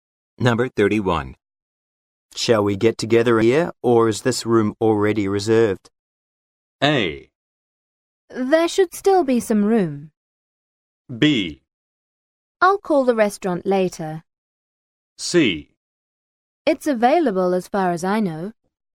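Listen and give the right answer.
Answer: C: It's available as far as I know.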